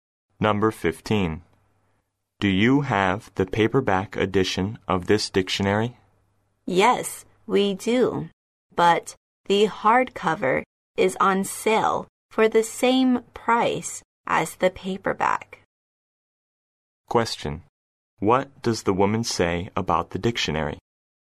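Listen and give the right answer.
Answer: The hardcover is on sale for the same price as the paperback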